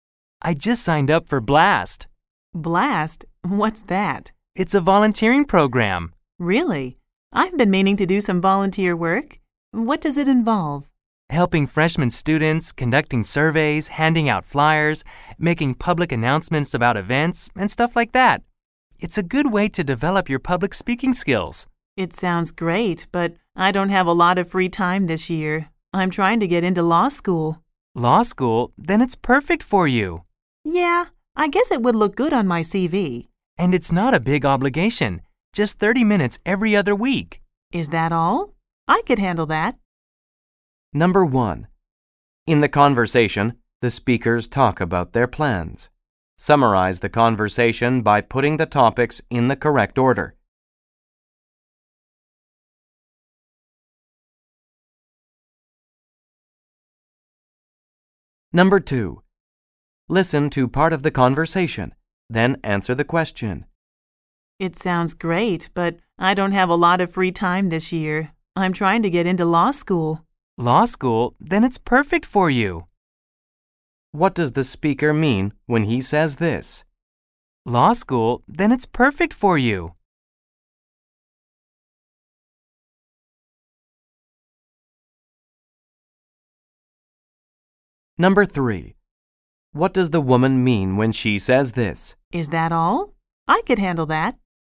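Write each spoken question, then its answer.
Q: What does the speaker mean when he says this?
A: The volunteer program would help her get into law school

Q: What does the woman mean when she says this?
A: She has enough time for it because it's only 30 minutes every other week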